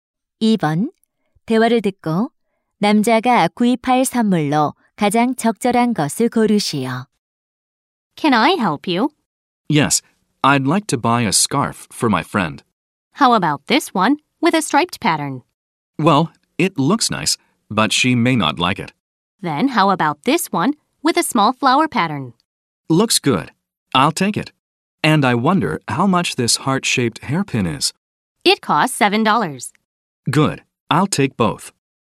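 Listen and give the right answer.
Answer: 작은 꽃무늬 스카프와 하트 모양 머리핀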